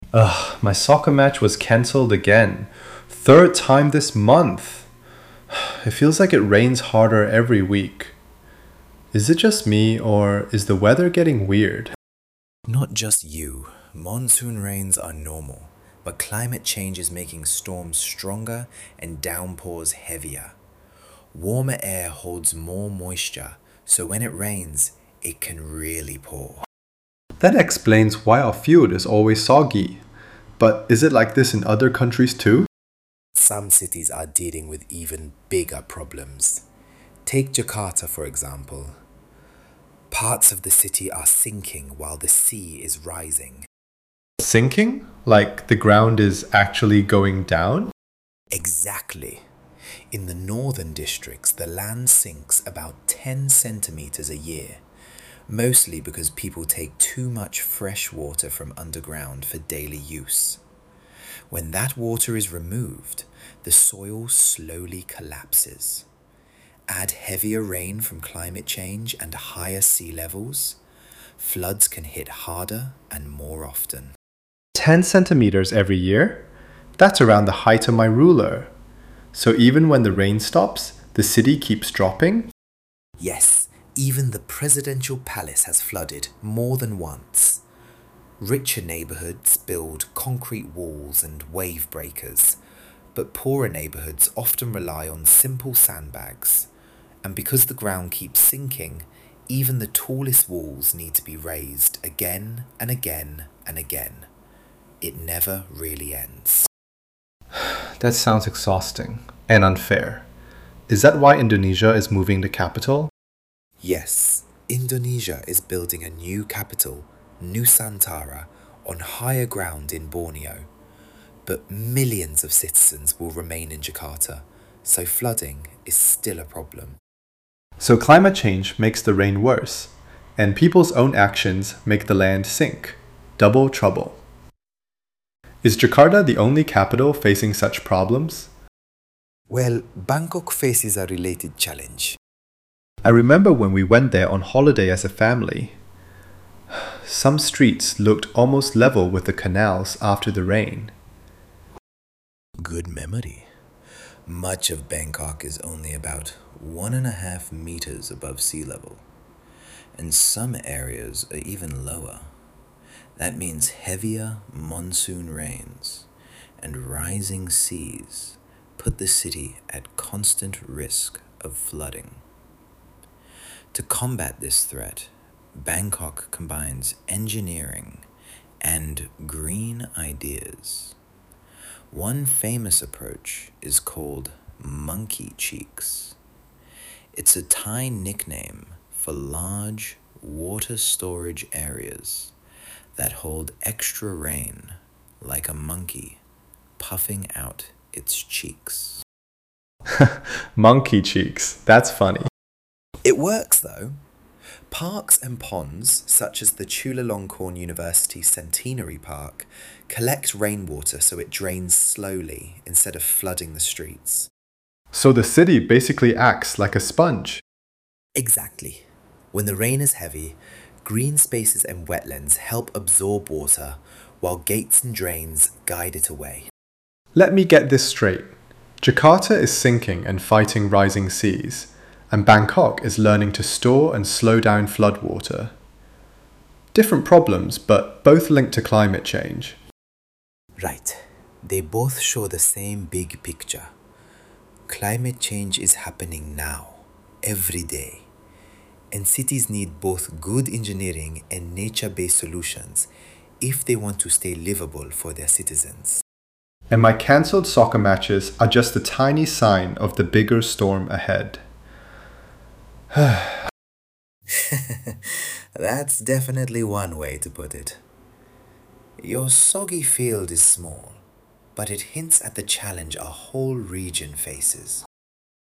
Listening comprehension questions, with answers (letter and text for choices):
For Questions 1–2, tick the answer (A,B,C or D) which fits best according to what you hear. There are two questions for each recording.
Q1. What is Bangkok's "Monkey Cheeks" designed to do?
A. Replace concrete drainage with natural wetlands throughout the city.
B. Store excess rainwater in ponds and parks before slowly releasing it.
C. Build a giant wall at sea.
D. Pump water out of the city after flooding.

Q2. What is the main message about climate change in Southeast Asian cities?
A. It mainly affects coastal areas but not inland regions.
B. It combines with human actions to increase flooding risks.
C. It causes only hotter temperatures, not heavier rain.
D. It has little impact on city life.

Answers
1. B. Store excess rainwater in ponds and parks before slowly releasing it.
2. B. It combines with human actions to increase flooding risks.

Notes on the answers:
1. "Monkey Cheeks" are a nature-based flood-control system, showing how green infrastructure can temporarily store heavy rain and reduce flooding.
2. Climate change and human decisions – such as groundwater use (Jakarta) and urban development (Bangkok) – combine to make flooding more frequent and severe.